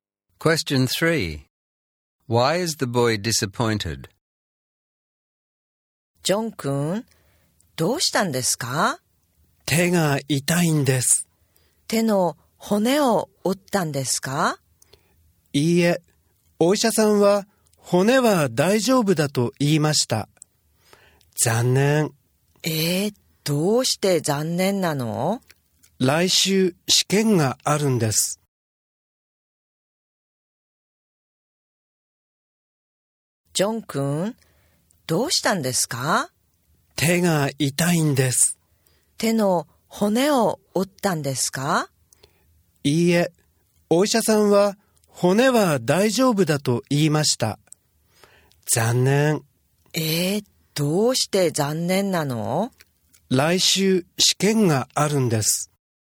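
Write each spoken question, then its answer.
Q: Why is the boy disappointed?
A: His hand isn't broken, so he will still have to sit the exam next week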